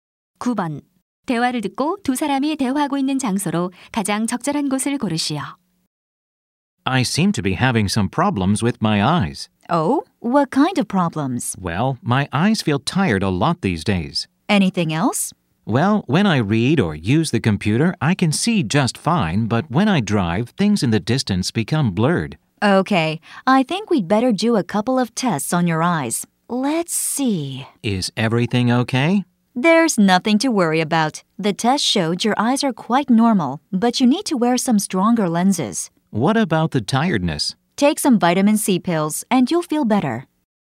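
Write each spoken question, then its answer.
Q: 대화를 듣고 두 사람이 대화하고 있는 장소로 가장 적절한 곳을 고르시오.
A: 안과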